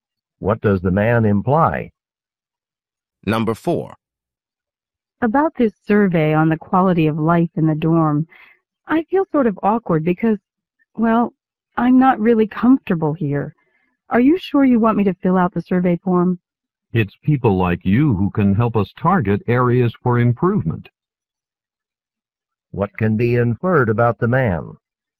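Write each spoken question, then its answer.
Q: What can be inferred about the man?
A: He is not satisfied with life in the dorm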